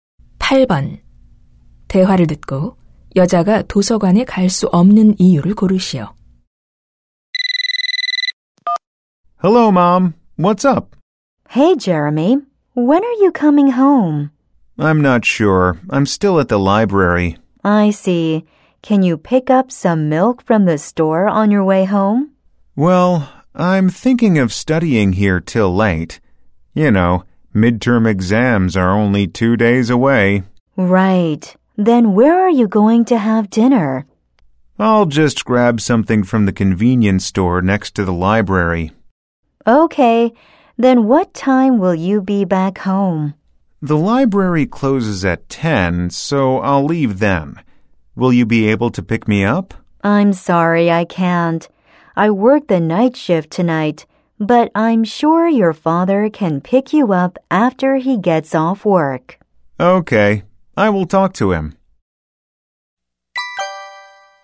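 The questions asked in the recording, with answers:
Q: 대화를 듣고 여자가 도서관에 갈 수 없는 이유를 고르시오.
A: 오늘 밤 야간 근무를 해야 해서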